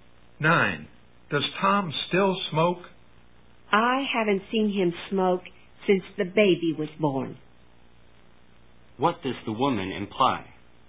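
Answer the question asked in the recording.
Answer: Tom has probably stopped smoking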